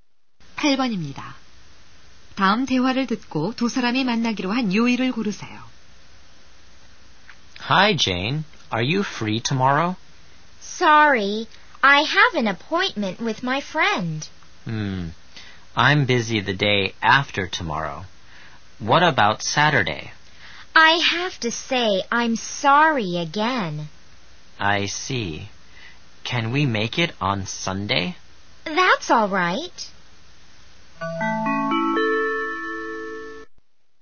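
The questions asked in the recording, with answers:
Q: 다음 대화를 듣고 두 사람이 만나기로 한 요일을 고르세요.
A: 일요일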